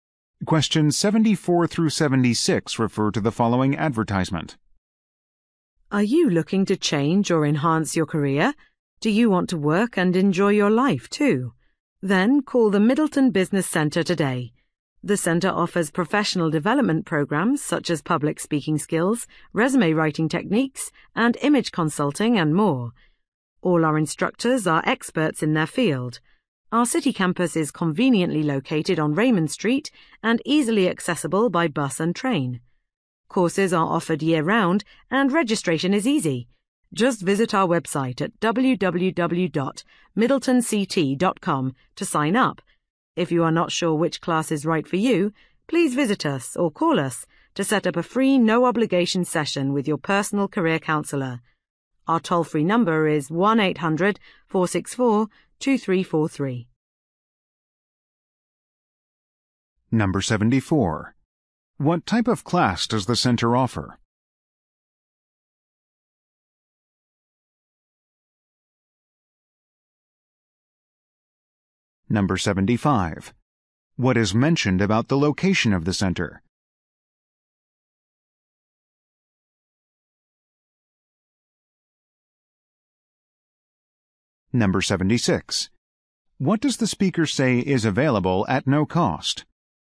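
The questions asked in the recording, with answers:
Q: What type of class does the center offer?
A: Professional development (career) classes

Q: What is mentioned about the location of the center?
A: It is easily accessible by bus and train

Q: What does the speaker say is available at no cost?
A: A session with a personal career counselor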